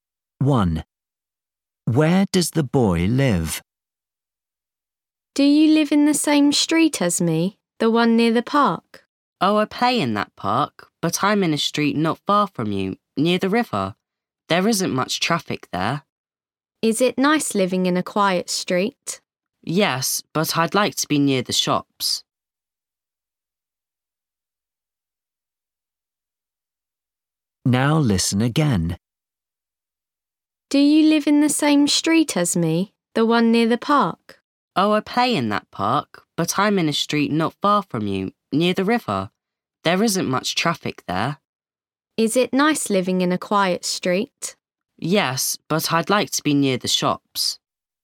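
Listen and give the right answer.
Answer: In a street near the river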